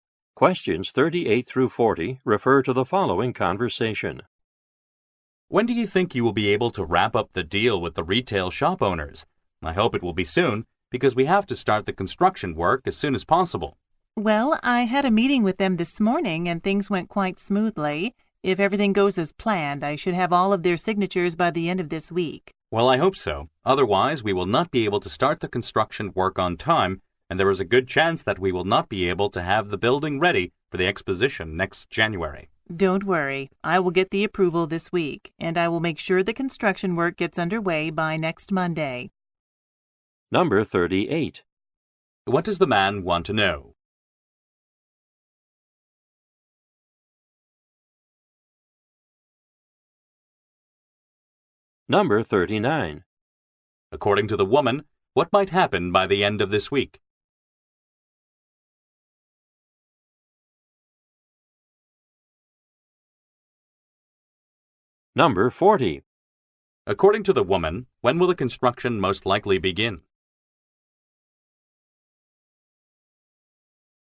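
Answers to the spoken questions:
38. When the deal with the retail shop owners will be wrapped up
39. She will have all the shop owners' signatures
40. By next Monday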